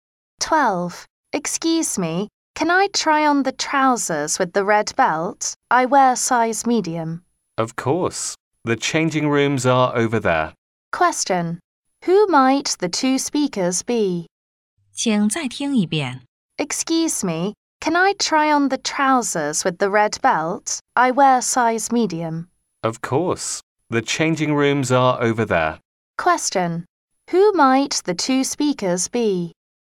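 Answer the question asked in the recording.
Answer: A customer and a shop assistant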